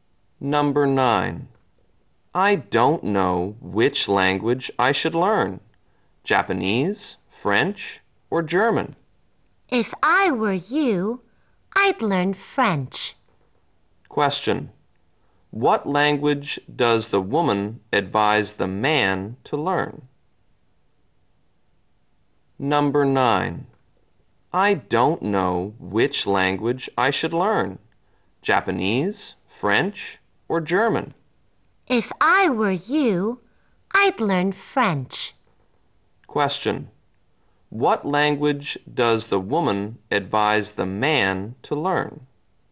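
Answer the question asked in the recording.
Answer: French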